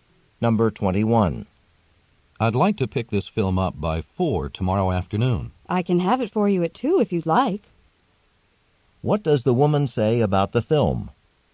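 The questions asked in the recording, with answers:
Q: What does the woman say about the film?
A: It can be ready earlier, at 2 tomorrow afternoon.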